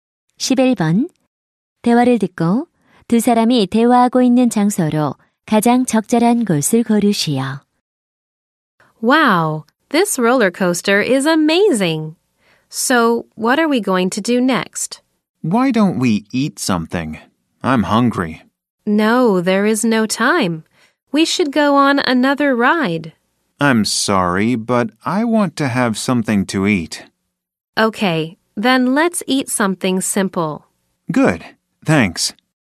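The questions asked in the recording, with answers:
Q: 대화를 듣고 두 사람이 대화하고 있는 장소로 가장 적절한 곳을 고르시오.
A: 놀이공원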